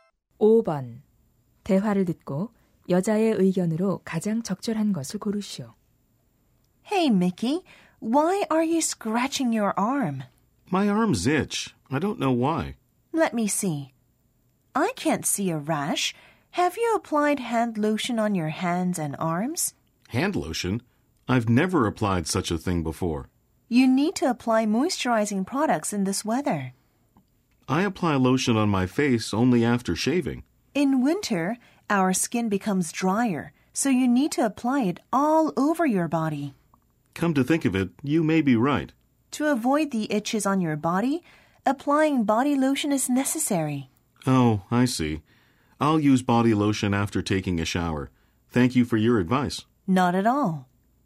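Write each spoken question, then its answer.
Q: 대화를 듣고 여자의 의견으로 가장 적절한 것을 고르시오.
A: 겨울철 가려움을 막으려면 몸 전체에 보습 로션을 발라야 한다.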